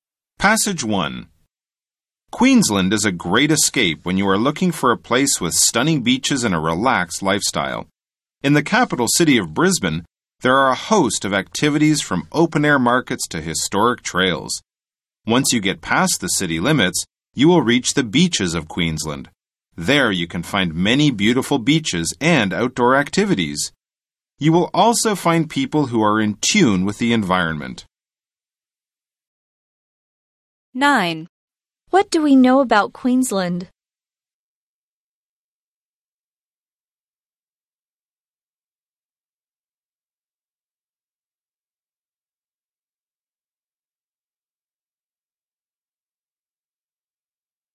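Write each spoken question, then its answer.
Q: What do we know about Queensland?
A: It has stunning beaches and a relaxed lifestyle.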